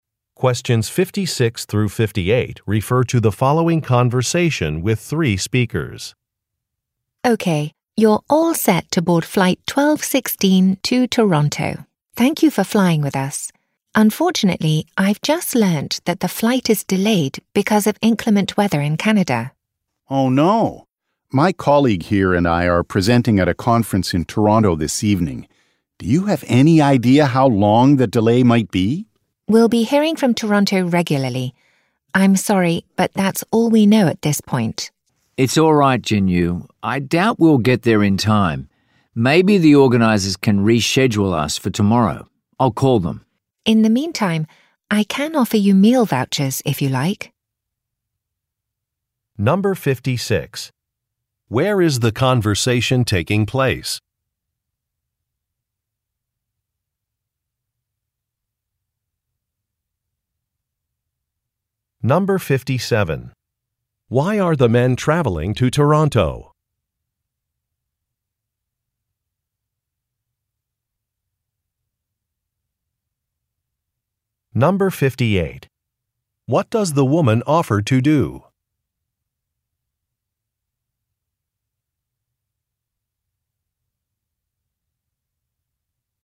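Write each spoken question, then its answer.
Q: Where is the conversation taking place?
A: At an airport

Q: Why are the men traveling to Toronto?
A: To present at a conference

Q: What does the woman offer to do?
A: Give them meal vouchers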